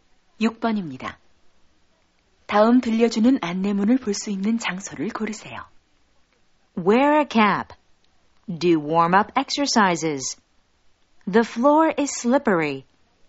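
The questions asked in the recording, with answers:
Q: 다음 들려주는 안내문을 볼 수 있는 장소를 고르세요.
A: 수영장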